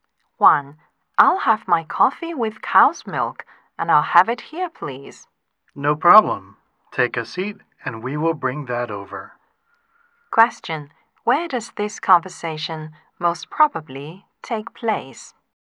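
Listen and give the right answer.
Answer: In a café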